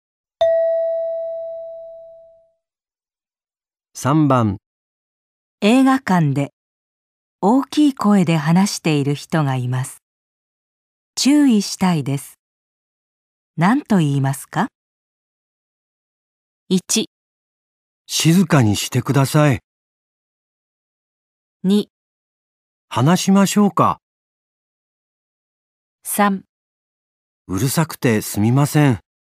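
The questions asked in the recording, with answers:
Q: 大きい声で話している人がいます。注意したいです。何と言いますか?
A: 1: 静かにしてください。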